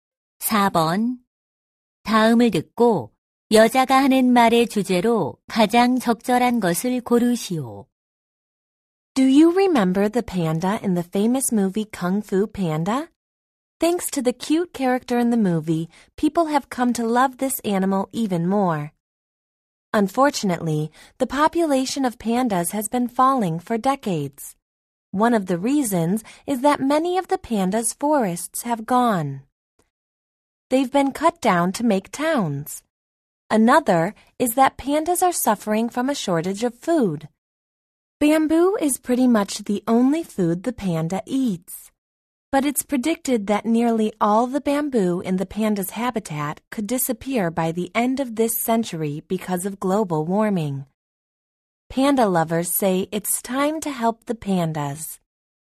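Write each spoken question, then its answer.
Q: 다음을 듣고 여자가 하는 말의 주제로 가장 적절한 것을 고르시오.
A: 판다 개체 수가 감소하는 원인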